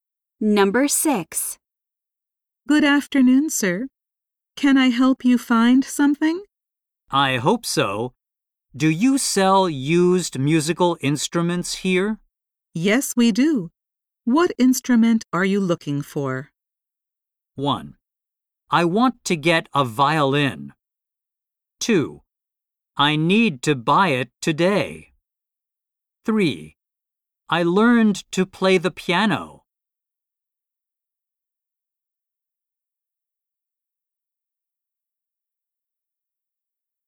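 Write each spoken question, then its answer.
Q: Yes, we do. What instrument are you looking for?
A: 1: I want to get a violin.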